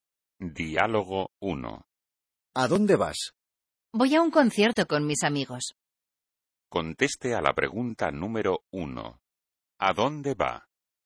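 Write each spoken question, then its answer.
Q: ¿A dónde va?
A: A un concierto con sus amigos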